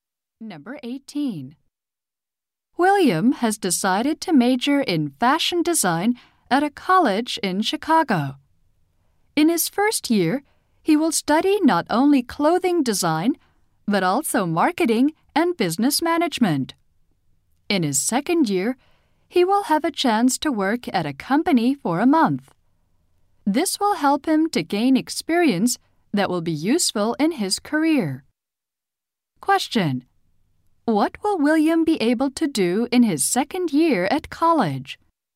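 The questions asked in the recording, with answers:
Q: What will William be able to do in his second year at college?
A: Work at a company for a month.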